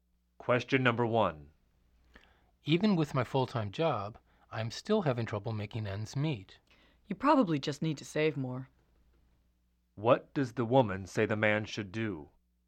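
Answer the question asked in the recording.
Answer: Save more money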